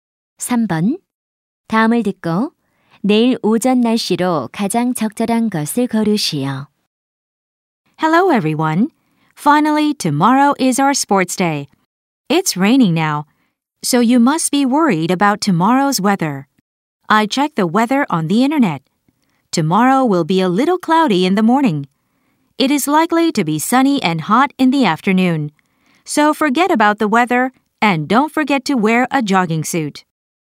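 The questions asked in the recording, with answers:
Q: 다음을 듣고 내일 오전 날씨로 가장 적절한 것을 고르시오.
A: 조금 흐림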